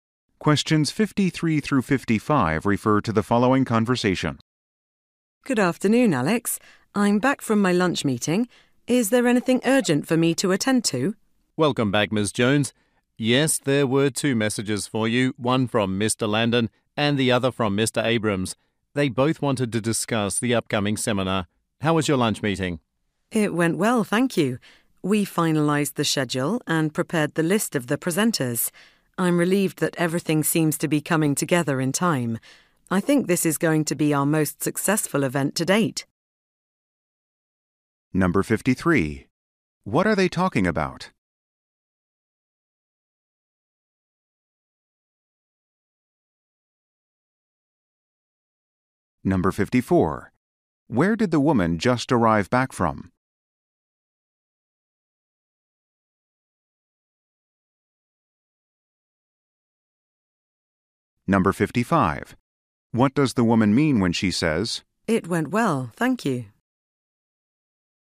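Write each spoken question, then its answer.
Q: What are they talking about?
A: The upcoming seminar

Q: Where did the woman just arrive back from?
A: A lunch meeting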